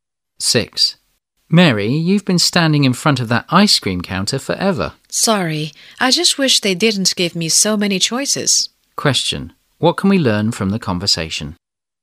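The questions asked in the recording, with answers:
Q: What can we learn from the conversation?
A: Mary can't decide which ice cream to choose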